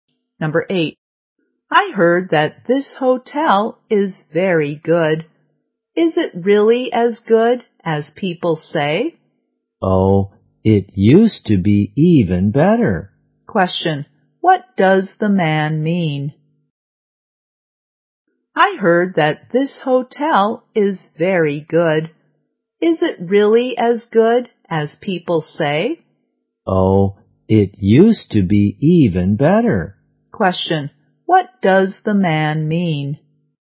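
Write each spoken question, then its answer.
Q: what does the man mean?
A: The hotel used to be better than it is now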